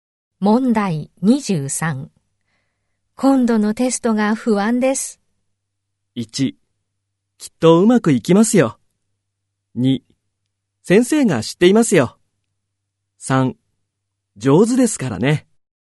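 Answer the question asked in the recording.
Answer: 1: きっとうまくいきますよ。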